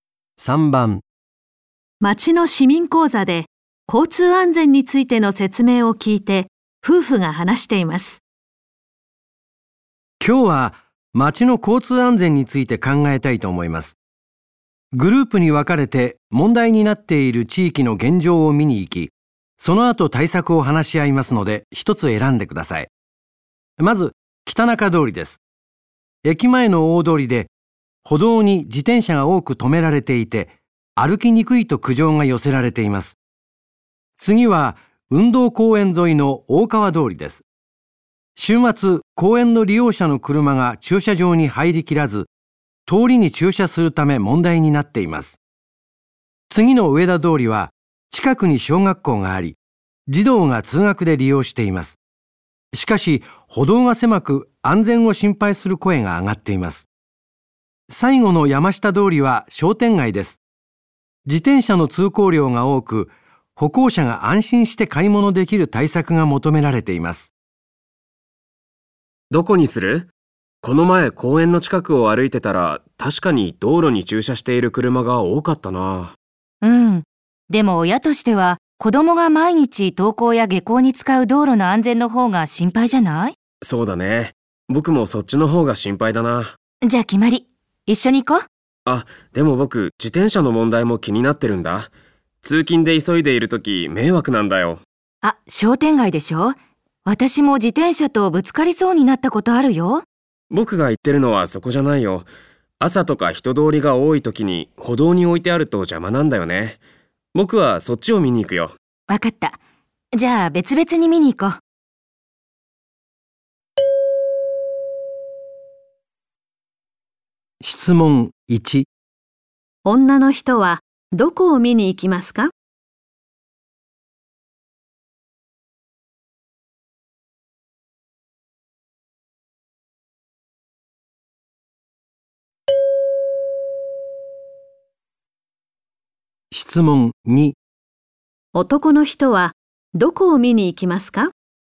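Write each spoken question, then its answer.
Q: 女の人はどこを見に行きますか?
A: 上田通り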